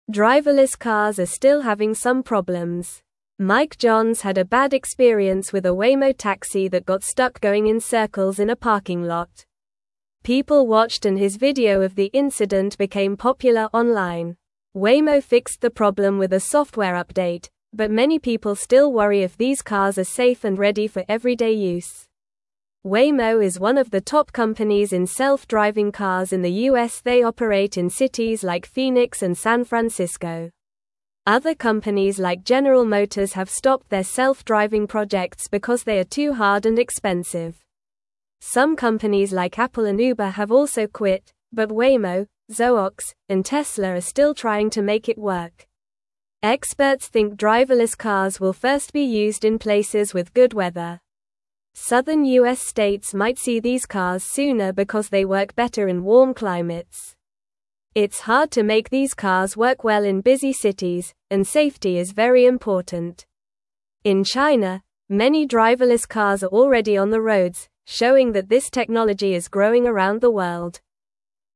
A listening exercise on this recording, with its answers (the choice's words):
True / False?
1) Some companies like General Motors and Apple have continued their self-driving projects.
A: False

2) A video of Mike's experience became popular online.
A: True

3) Waymo fixed the taxi problem with a software update.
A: True

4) Waymo is not one of the top companies making self-driving cars in the U.S.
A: False

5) Driverless cars still have some problems.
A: True

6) Mike Johns had a bad experience with a Waymo taxi.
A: True

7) The Waymo taxi smoothly navigated through a busy city center.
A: False

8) Few people worry about the safety of driverless cars.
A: False

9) Driverless cars are still having some (1)______s.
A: problem

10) Mike Johns had a bad experience with a (2)______ taxi that got stuck going in circles in a parking lot.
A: Waymo

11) People watched and his video of the incident became (3)______ online.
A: popular

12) Waymo fixed the problem with a software update, but many (4)______ still worry if these cars are safe and ready for everyday use.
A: people

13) They operate in cities like Phoenix and San (5)______.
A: Francisco

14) Other companies like General (6)______ have stopped their self-driving projects because they are too hard and expensive.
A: Motors

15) Some companies like Apple and Uber have also (7)______, but Waymo, Zoox, and Tesla are still trying to make it work.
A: quit

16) Experts think driverless cars will first be used in places with good (8)______.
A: weather

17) (9)______ U.S. states might see these cars sooner because they (10)______ better in warm climates.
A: Southern

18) (9)______ U.S. states might see these cars sooner because they (10)______ better in warm climates.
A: work

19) In China, many (11)______ cars are already on the (12)______, showing that this technology is growing around the world.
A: driverless

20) In China, many (11)______ cars are already on the (12)______, showing that this technology is growing around the world.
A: roads

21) What happened to Mike Johns with a Waymo taxi?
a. It got stuck going in circles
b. It drove too fast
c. It ran out of gas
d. It parked in the wrong spot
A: It got stuck going in circles

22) What did Waymo do to fix the taxi problem?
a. They built a new taxi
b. They stopped using taxis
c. They changed drivers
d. They made a software update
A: They made a software update

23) Which company is known for self-driving cars in the U.S.?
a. Ford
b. Honda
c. Waymo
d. Nissan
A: Waymo

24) Which cities does Waymo operate in?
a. New York and Chicago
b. Phoenix and San Francisco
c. Los Angeles and Miami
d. Seattle and Boston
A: Phoenix and San Francisco

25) Why do driverless cars work better in southern U.S. states?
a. Because there are fewer cars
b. Because the roads are wider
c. Because they have warm climates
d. Because people drive less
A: Because they have warm climates

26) Where are many driverless cars already on the roads?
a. In Canada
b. In China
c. In Australia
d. In Mexico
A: In China

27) What happened to Mike Johns when he used a Waymo taxi?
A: Mike Johns's Waymo taxi got stuck going in circles in a parking lot.

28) Which company is known for making self-driving cars in the U.S.?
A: Waymo is known for making self-driving cars in the U.S.

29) What cities does Waymo operate in?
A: Waymo operates in cities like Phoenix and San Francisco.

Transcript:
Driverless cars are still having some problems. Mike Johns had a bad experience with a Waymo taxi that got stuck going in circles in a parking lot. People watched and his video of the incident became popular online. Waymo fixed the problem with a software update, but many people still worry if these cars are safe and ready for everyday use.
Waymo is one of the top companies in self-driving cars in the U.S. They operate in cities like Phoenix and San Francisco. Other companies like General Motors have stopped their self-driving projects because they are too hard and expensive. Some companies like Apple and Uber have also quit, but Waymo, Zoox, and Tesla are still trying to make it work.
Experts think driverless cars will first be used in places with good weather. Southern U.S. states might see these cars sooner because they work better in warm climates. It's hard to make these cars work well in busy cities, and safety is very important. In China, many driverless cars are already on the roads, showing that this technology is growing around the world.

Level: Level 2